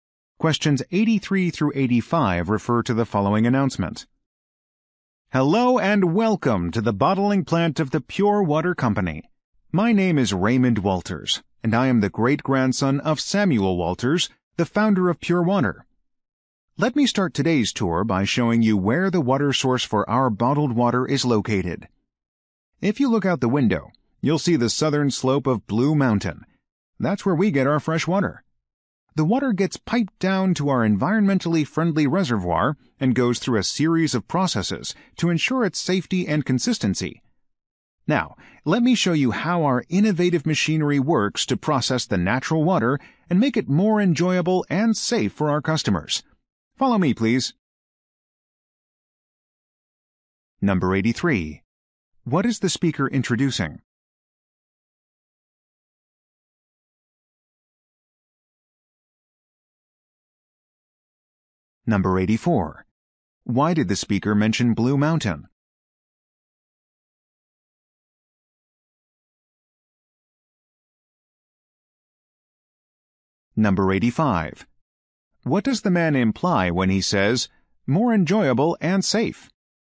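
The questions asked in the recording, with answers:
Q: What is the speaker introducing?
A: A tour of the bottling plant

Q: Why did the speaker mention Blue Mountain?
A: It is the water source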